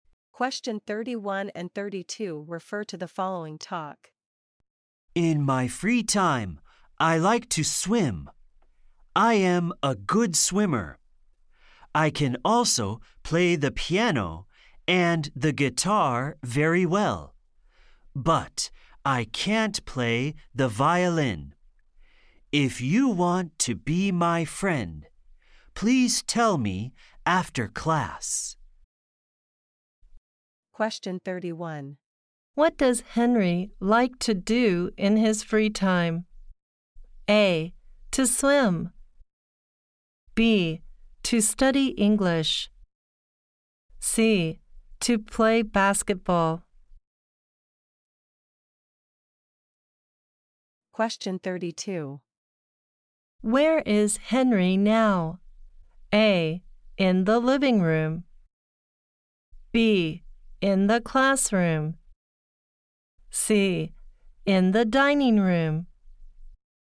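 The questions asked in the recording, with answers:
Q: What does Henry like to do in his free time?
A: A: To swim.

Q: Where is Henry now?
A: B: In the classroom.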